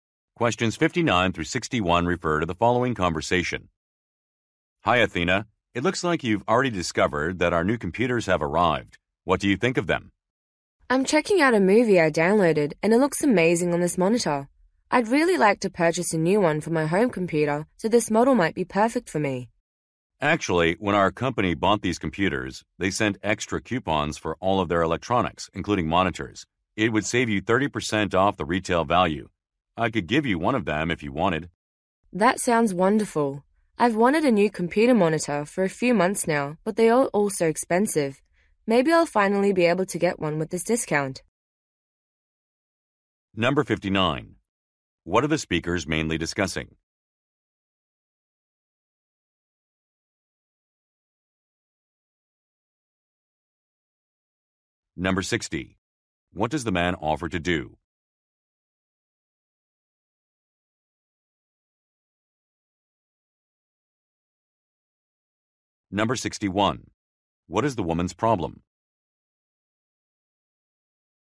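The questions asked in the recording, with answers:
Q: What are the speakers mainly discussing?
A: The company's new computers

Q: What does the man offer to do?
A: Give her a discount coupon

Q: What is the woman's problem?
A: Monitors are too expensive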